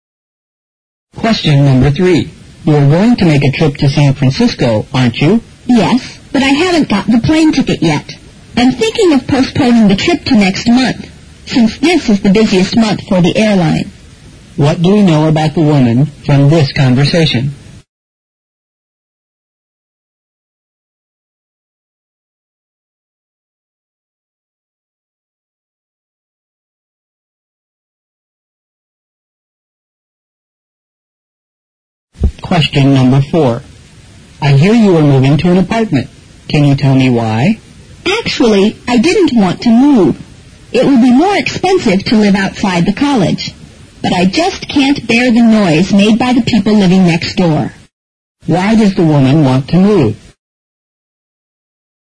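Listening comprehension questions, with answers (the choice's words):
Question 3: What do we know about the woman fromthis conversation?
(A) She has to change the time for the trip.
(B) She hasn't decided where to go next month.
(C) She can't afford the time for the trip.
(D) She will manage to leave this month.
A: She has to change the time for the trip.

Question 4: Why does the woman want to move?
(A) The apartment is better furnished.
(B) She prefers to live in a quiet place.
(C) It's less expensive to live in an apartment.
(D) She finds her roommates difficult to get along with.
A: She prefers to live in a quiet place.

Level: 六级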